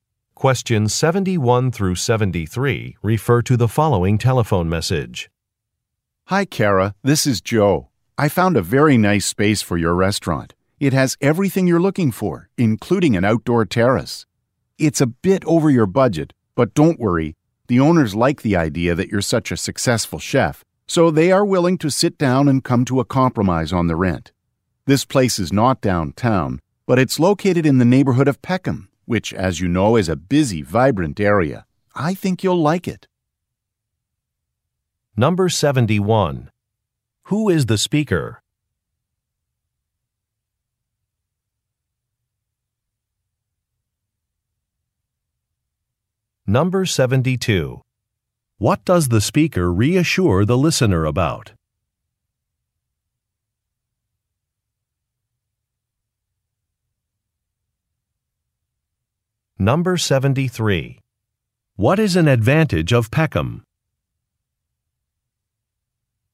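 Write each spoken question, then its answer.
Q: What does the speaker reassure the listener about?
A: The rent is negotiable despite being over budget

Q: What is an advantage of Peckham?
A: It is a busy, vibrant area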